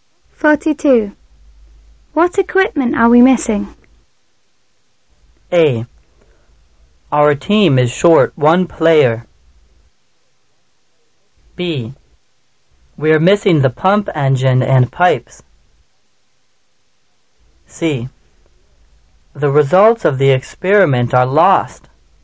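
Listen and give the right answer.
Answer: B: We're missing the pump engine and pipes.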